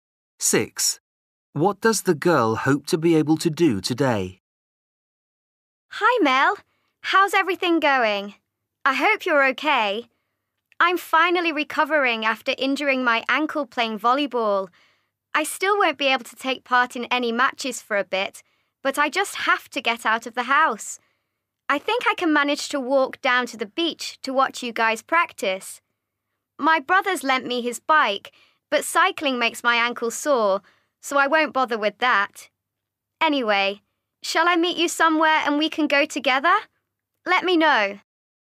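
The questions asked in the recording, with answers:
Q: What does the girl hope to be able to do today?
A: walk to the beach to watch volleyball practice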